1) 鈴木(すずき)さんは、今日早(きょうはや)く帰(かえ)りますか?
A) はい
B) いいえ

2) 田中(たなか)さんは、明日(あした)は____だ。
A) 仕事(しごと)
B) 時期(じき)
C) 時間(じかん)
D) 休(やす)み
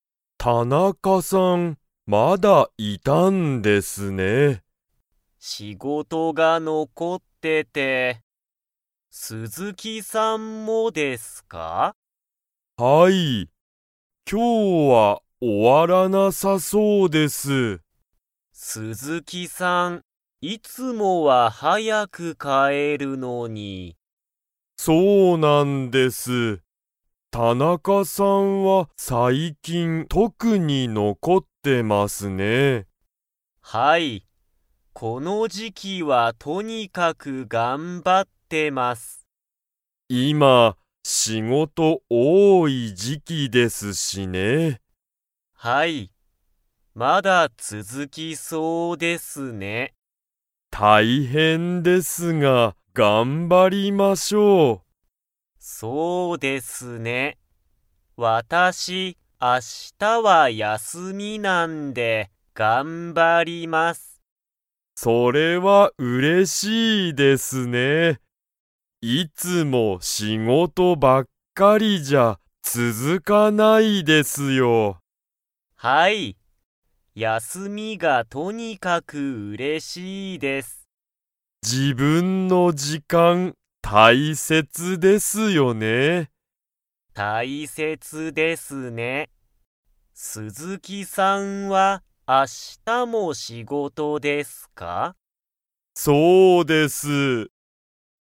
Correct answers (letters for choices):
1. B
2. D

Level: Level 2